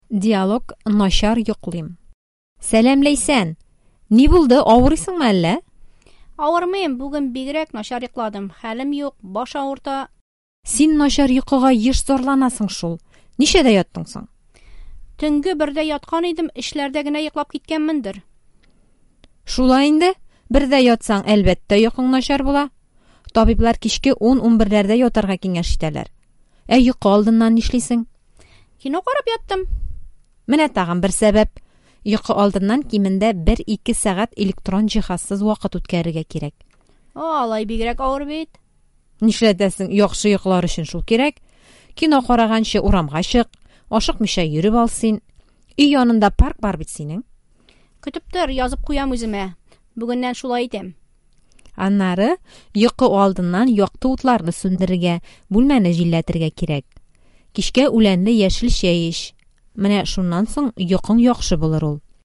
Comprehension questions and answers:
Бирем. Дөресме, ялгышмы? Отметьте, верны ли эти утверждения:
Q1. Ләйсән бүген начар йоклады.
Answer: дөрес

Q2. Ләйсән начар йокыга сирәк зарлана.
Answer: ялгыш

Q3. Ләйсән төнге өчтә йокларга ятты.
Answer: ялгыш

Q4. Ләйсән төнге бердә йокларга ятты.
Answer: дөрес

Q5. Табиблар кичке 10-11дә ятарга киңәш итәләр.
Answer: дөрес

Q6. Ләйсән йокы алдыннан паркта йөрде.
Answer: ялгыш

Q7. Ләйсән парк янында яши.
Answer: дөрес

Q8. Йокы алдыннан бүлмәне җилләтергә кирәк.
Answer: дөрес

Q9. Ләйсән Алия киңәшләренә игътибар бирмәде.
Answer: ялгыш